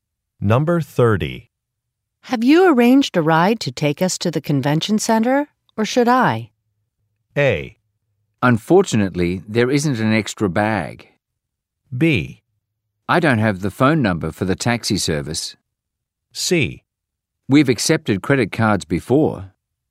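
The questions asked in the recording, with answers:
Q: Have you arranged a ride to take us to the convention center, or should I?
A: B: I don't have the phone number for the taxi service.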